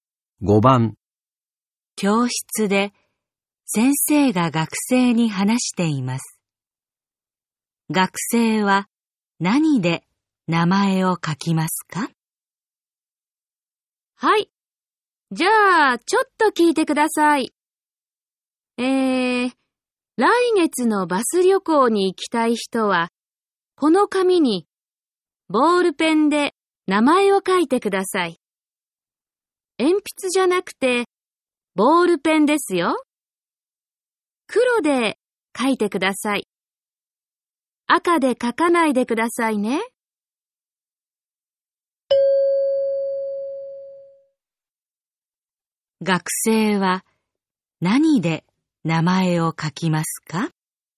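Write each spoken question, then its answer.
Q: 学生は何で名前を書きますか?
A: 黒のボールペン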